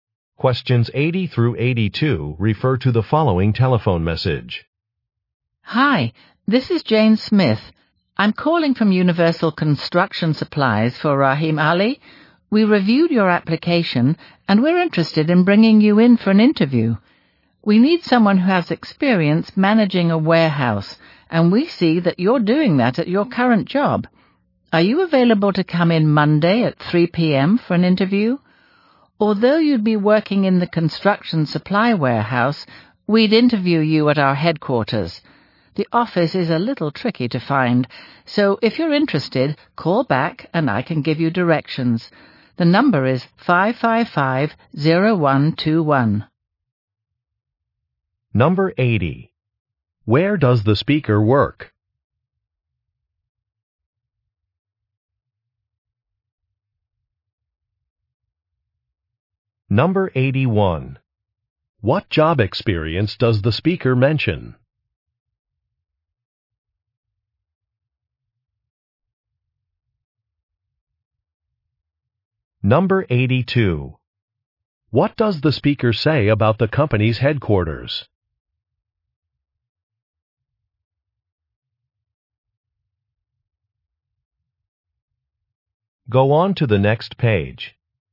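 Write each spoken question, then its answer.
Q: Where does the speaker work?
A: At a construction supply company

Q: What job experience does the speaker mention?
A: Managing a warehouse

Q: What does the speaker say about the company's headquarters?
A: It is hard to find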